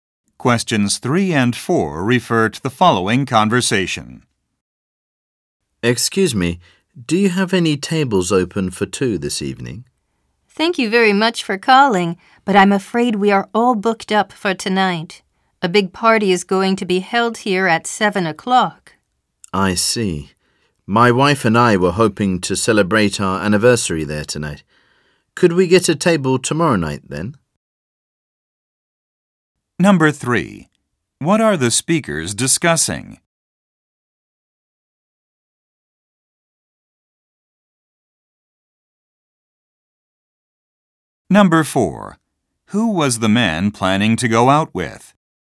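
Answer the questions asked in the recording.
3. A restaurant table reservation
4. His wife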